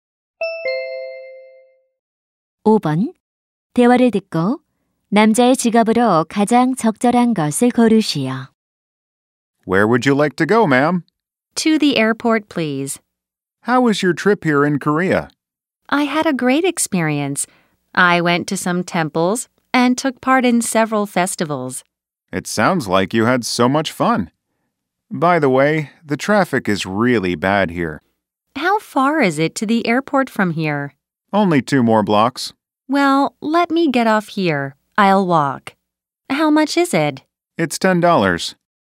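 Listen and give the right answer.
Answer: 택시 기사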